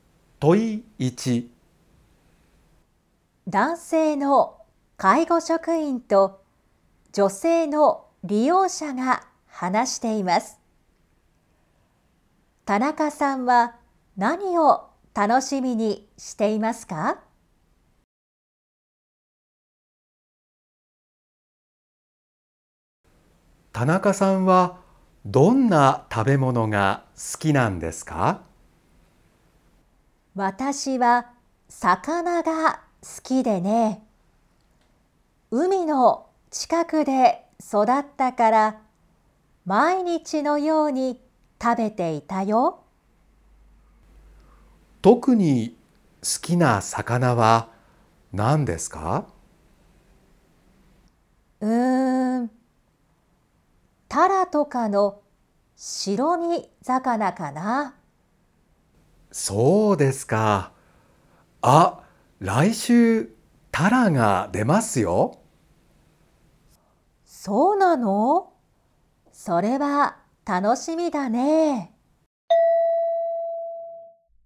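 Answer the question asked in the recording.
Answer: 来週の食事にタラが出ること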